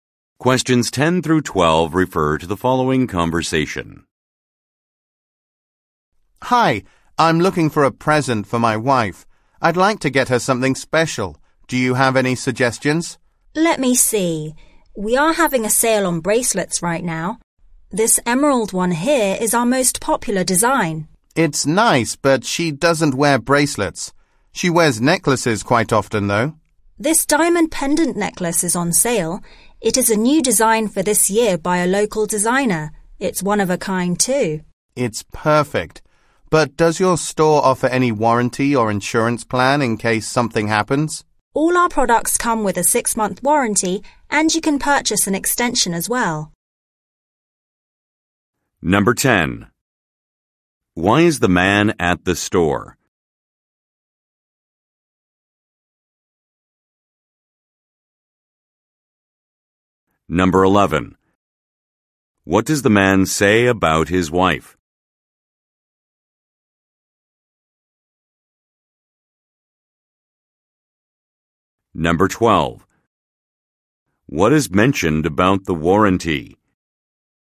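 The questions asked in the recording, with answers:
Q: Why is the man at the store?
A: To buy a present for his wife

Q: What does the man say about his wife?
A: She doesn't wear bracelets but often wears necklaces

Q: What is mentioned about the warranty?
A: It lasts 6 months and can be extended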